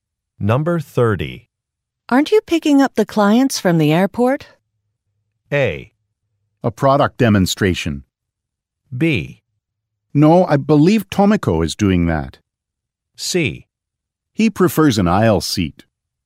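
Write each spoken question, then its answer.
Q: Aren't you picking up the clients from the airport?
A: B: No, I believe Tomiko is doing that.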